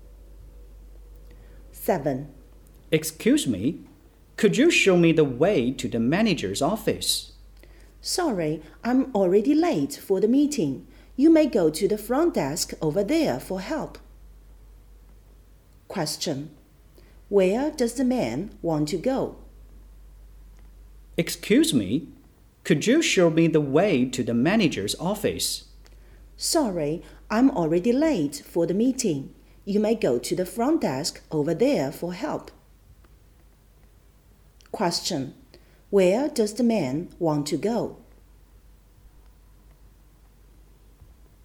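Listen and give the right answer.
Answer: The manager's office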